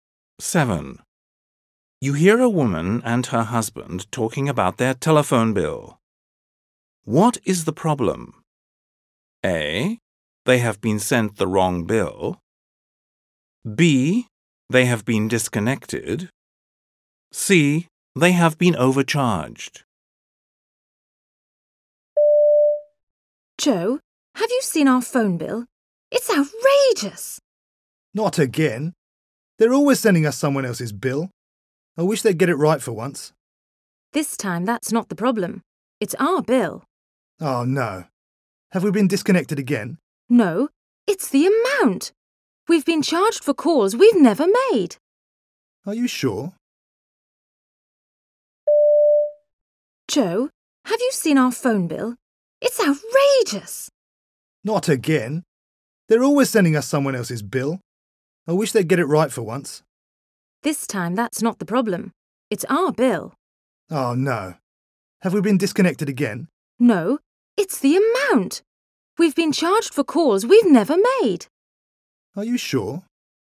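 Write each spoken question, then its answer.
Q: What is the problem?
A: C: They have been overcharged.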